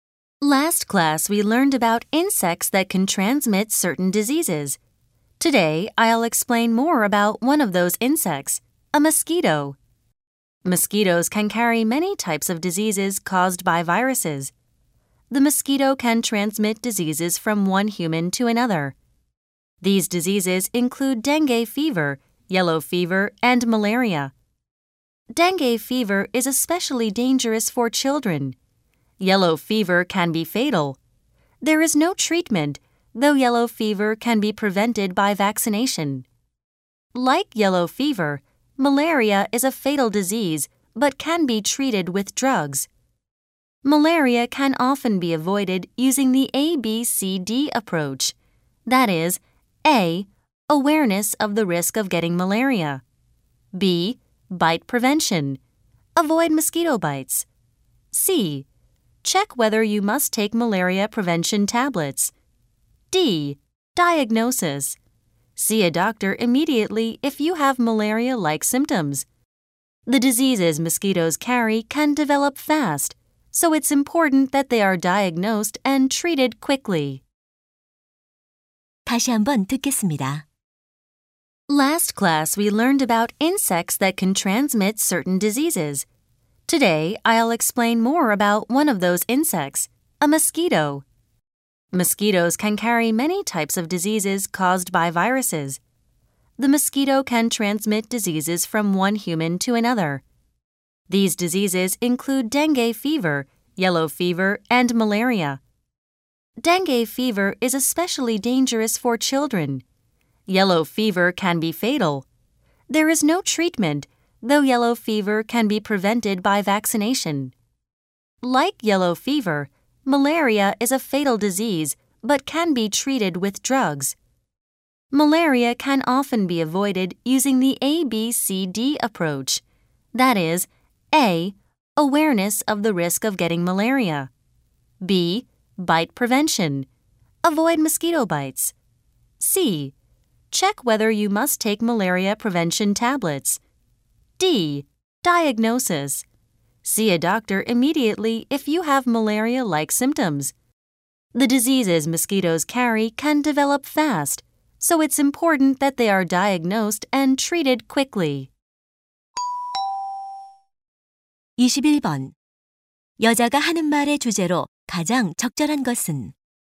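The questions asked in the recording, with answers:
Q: 여자가 하는 말의 주제로 가장 적절한 것은?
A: 모기가 옮기는 질병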